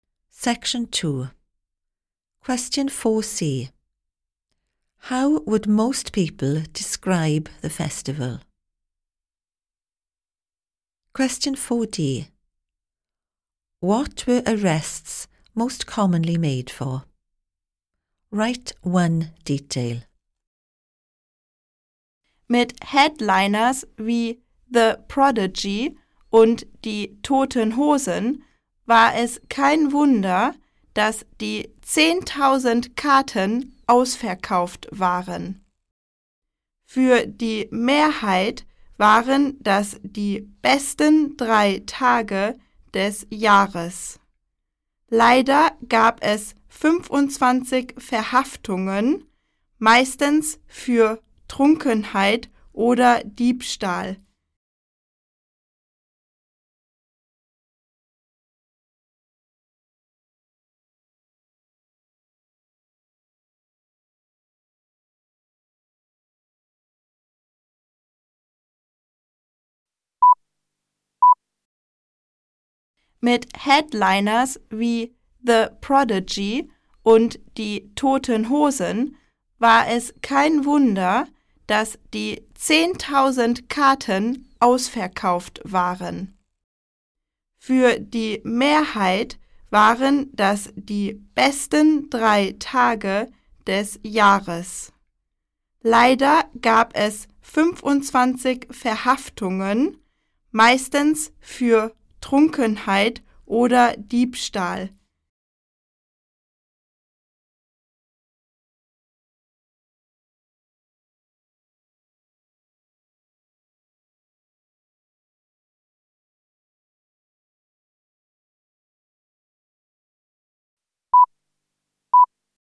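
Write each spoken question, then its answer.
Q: How would most people describe the festival?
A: The best three days of the year

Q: What were arrests most commonly made for?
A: Drunkenness or theft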